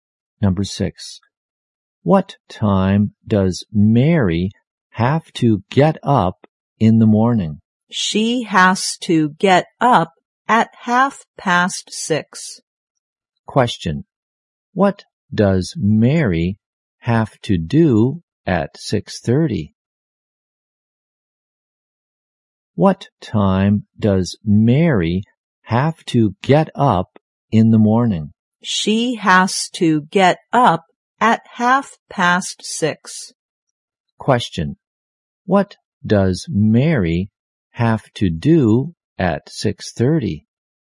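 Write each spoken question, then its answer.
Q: What does Mary have to do at 6:30?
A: Get up.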